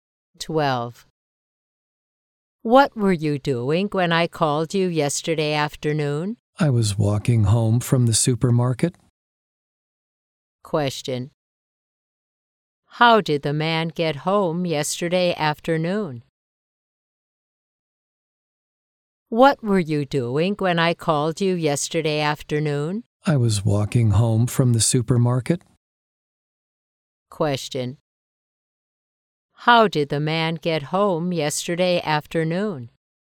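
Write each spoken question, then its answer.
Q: How did the man get home yesterday afternoon?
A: On foot (he walked).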